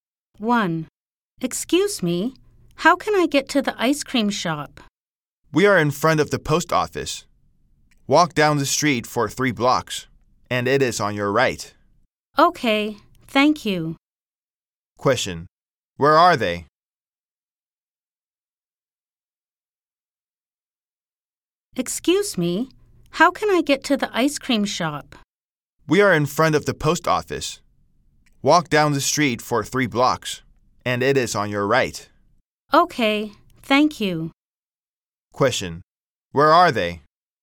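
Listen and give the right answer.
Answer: In front of the post office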